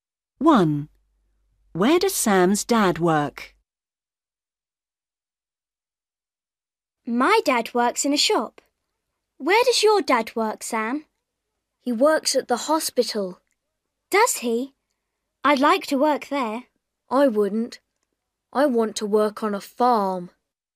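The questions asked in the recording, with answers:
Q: Where does Sam's dad work?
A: at the hospital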